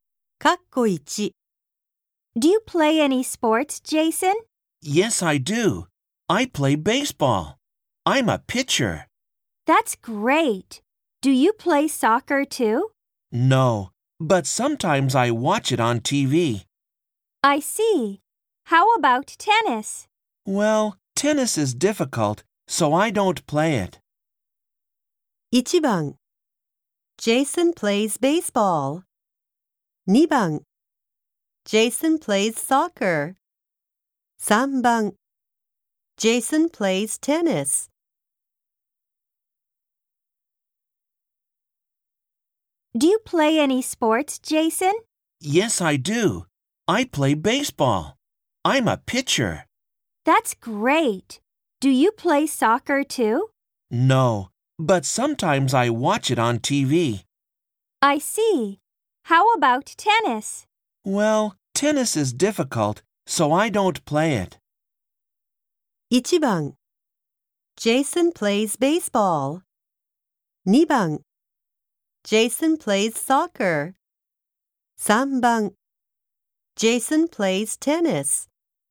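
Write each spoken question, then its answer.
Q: 1番 Jason plays baseball. 2番 Jason plays soccer. 3番 Jason plays tennis.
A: 1: Jason plays baseball.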